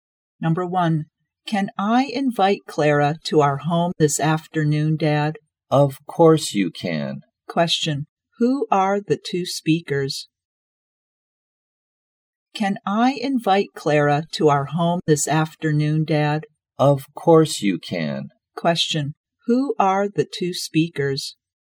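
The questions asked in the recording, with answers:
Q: who are the two speakers?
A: Father and child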